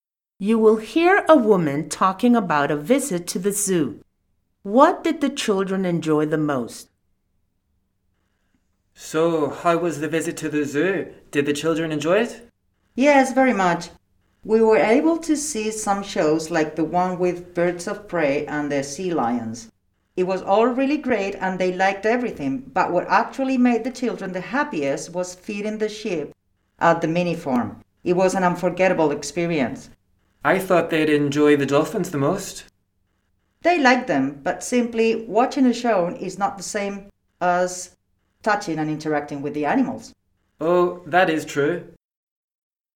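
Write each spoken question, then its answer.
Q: What did the children enjoy the most?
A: Feeding the sheep at the mini farm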